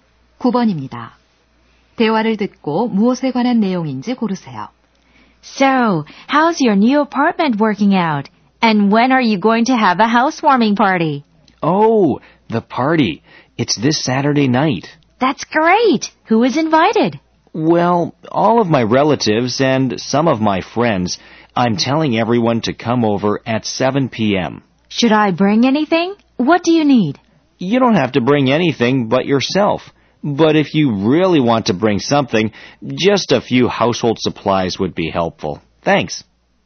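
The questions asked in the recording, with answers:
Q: 대화를 듣고 무엇에 관한 내용인지 고르세요.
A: 집들이 파티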